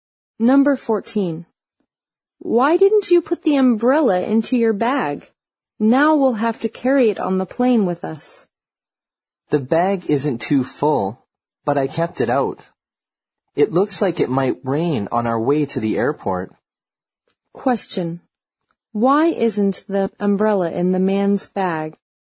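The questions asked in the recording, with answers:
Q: Why isn't the umbrella in the man's bag?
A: It might rain on the way to the airport.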